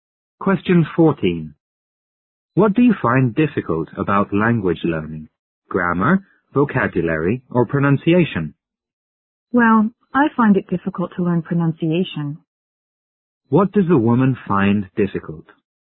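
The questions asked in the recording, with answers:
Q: What does the woman find difficult?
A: Pronunciation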